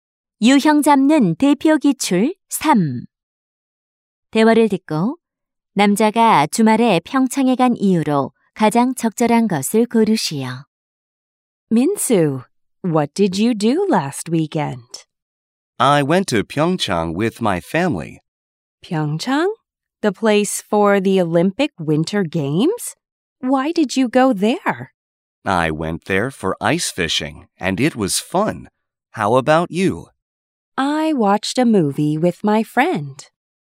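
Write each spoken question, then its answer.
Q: 대화를 듣고 남자가 주말에 평창에 간 이유로 가장 적절한 것을 고르시오.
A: 얼음낚시를 하러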